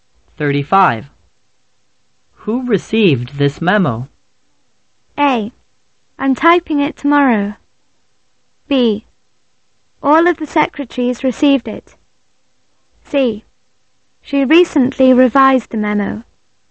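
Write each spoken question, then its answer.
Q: Who received this memo?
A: B: All of the secretaries received it.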